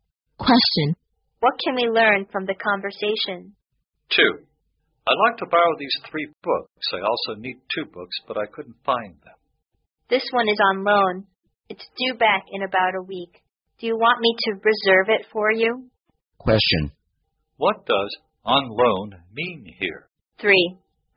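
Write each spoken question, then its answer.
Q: What does on loan mean here?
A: Someone else has borrowed it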